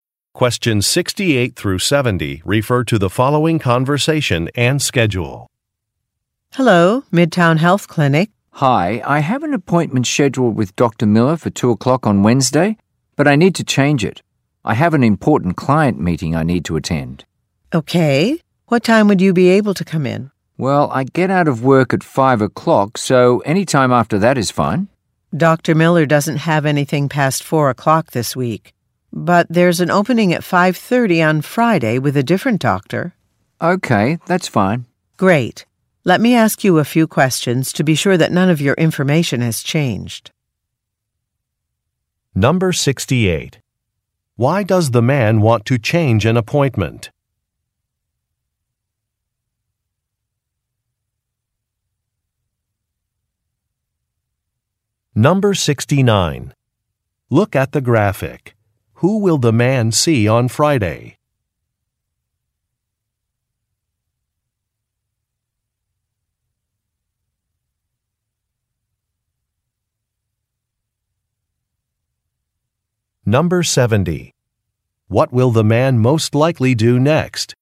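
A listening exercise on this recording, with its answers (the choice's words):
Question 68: Why does the man want to change an appointment?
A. His car broke down.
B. He has to attend a meeting.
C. He has a family event.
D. He has to wait for a delivery.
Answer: He has to attend a meeting.

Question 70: What will the man most likely do next?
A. Answer some questions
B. Visit a Web site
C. Make a payment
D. Drive to an office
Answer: Answer some questions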